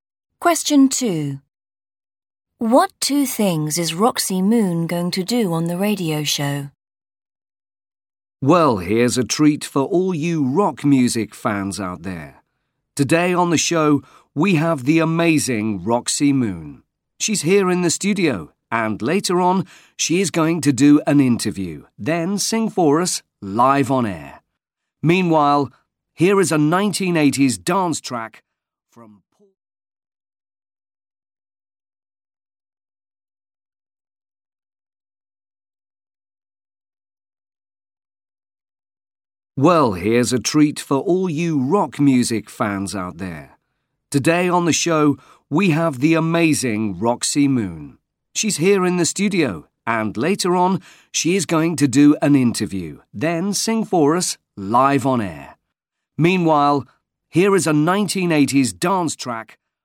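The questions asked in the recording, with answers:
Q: What two things is Roxy Moon going to do on the radio show?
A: do an interview and sing live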